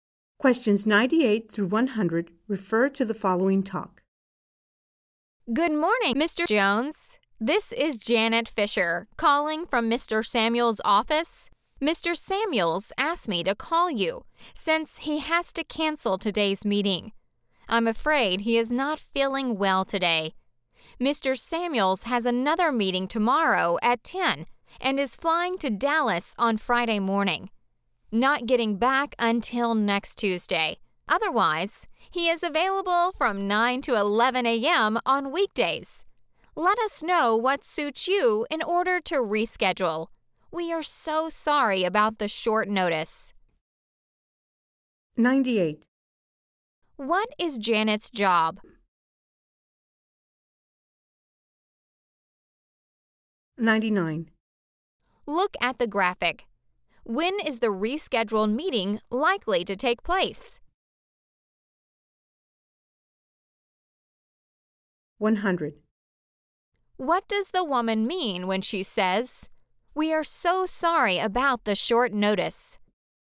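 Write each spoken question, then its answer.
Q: What does the woman mean when she says, "We are so sorry about the short notice"?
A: She is apologizing for cancelling the meeting at the last minute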